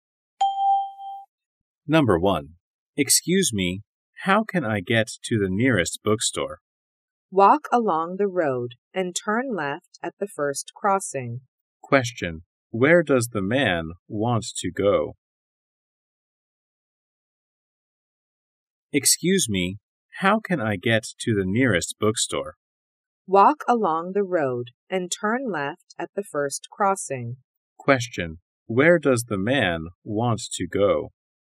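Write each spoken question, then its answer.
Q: Question, where does the man want to go?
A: The nearest bookstore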